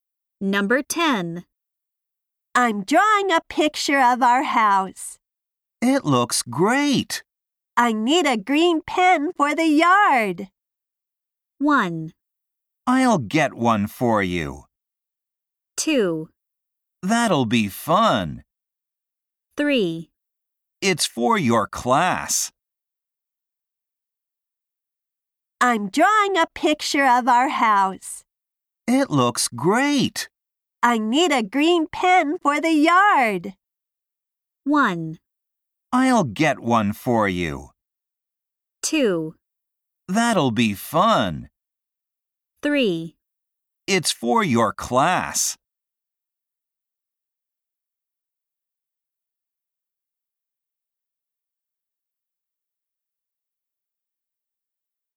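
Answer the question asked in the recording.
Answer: 1: I'll get one for you.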